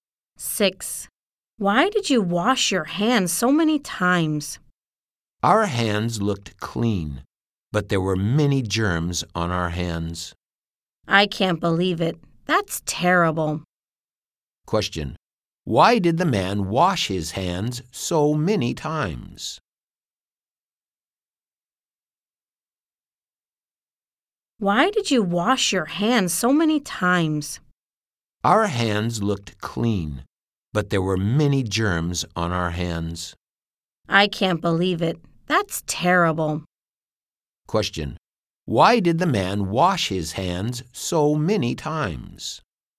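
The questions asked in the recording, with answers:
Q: Question, why did the man wash his hands so many times?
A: There were many germs on their hands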